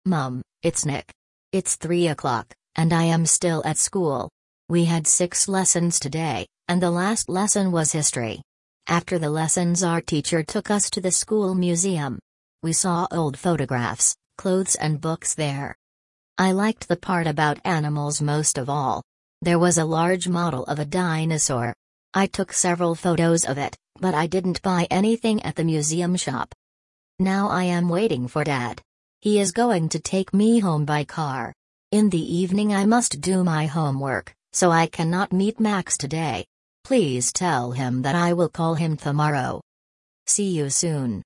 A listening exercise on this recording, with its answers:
Прослушайте текст и определите, какие из приведённых утверждений A–E соответствуют содержанию текста (1 — True), а какие не соответствуют (2 — False). Вы услышите текст дважды.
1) Nick and his classmates visited a museum.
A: True

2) Nick bought a book about dinosaurs.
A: False

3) Nick is going to meet his friend in the evening.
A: False

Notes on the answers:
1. После уроков учитель отвёл учеников в школьный музей.
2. Ник сфотографировал модель динозавра, но ничего не купил в музейном магазине.
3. Вечером Ник должен делать домашнее задание и не сможет встретиться с Максом.

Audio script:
Mum, it's Nick.
It's three o'clock, and I am still at school. We had six lessons today, and the last lesson was History. After the lessons our teacher took us to the school museum. We saw old photographs, clothes and books there.
I liked the part about animals most of all. There was a large model of a dinosaur. I took several photos of it, but I didn't buy anything at the museum shop.
Now I am waiting for Dad. He is going to take me home by car. In the evening I must do my homework, so I cannot meet Max today. Please tell him that I will call him tomorrow.
See you soon.

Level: 5 класса